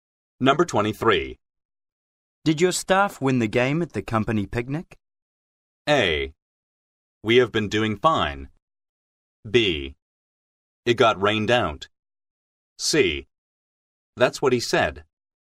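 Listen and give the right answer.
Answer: B: It got rained out.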